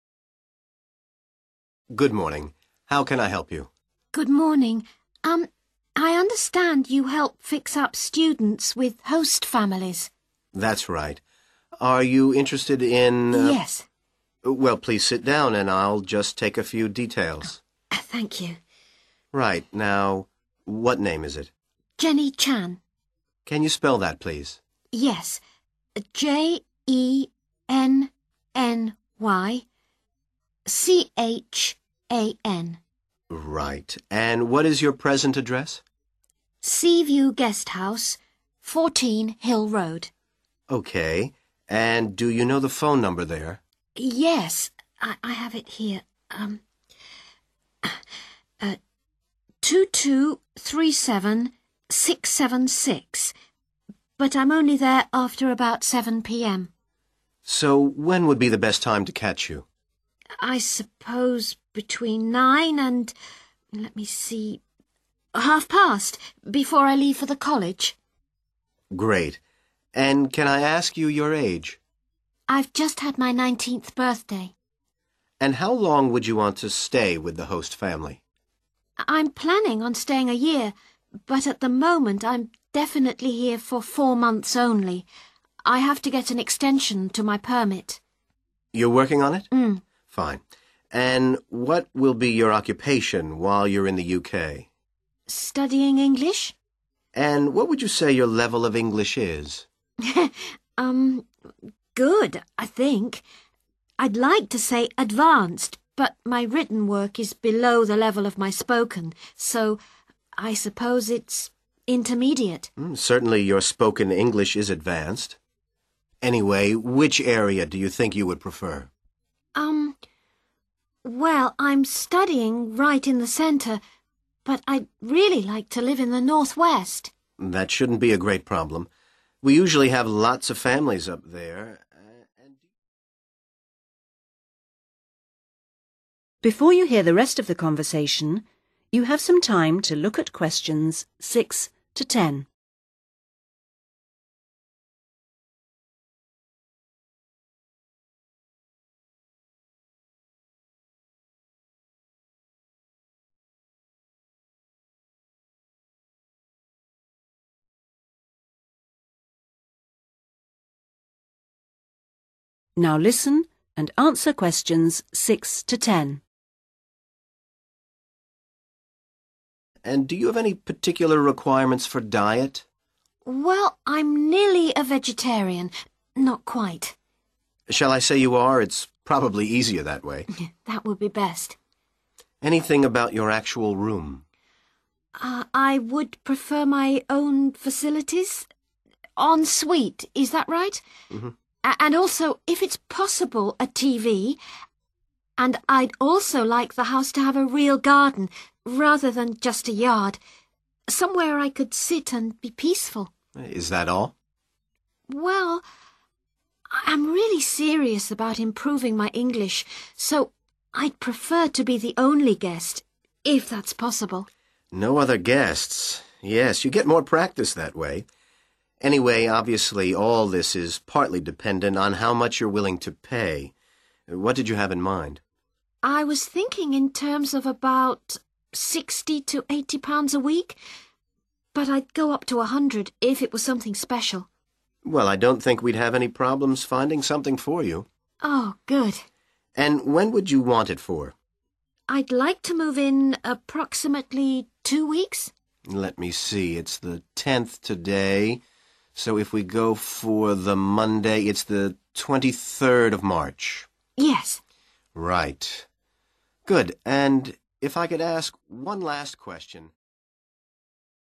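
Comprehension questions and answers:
Complete the form below, using NO MORE THAN THREE WORDS AND/OR A NUMBER for each answer.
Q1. Present address: Sea View Guest House, 1 ...........................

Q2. [NB Best lime to contact is 2 ...........................]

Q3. Intended length of stay: 3 ..............................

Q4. General level of English: 4 .....................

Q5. Preferred location: in the 5 .........................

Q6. Special diet: 6 ...........................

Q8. to be 8 ......................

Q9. Maximum price: 9 £ .......................... a week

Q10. Preferred starting date: 10 ......................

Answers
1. 4 Hill Road
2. between 9 and 9:30
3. 4 months
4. intermediate
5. northwest
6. vegetarian
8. the only guest
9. 100
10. 23rd of March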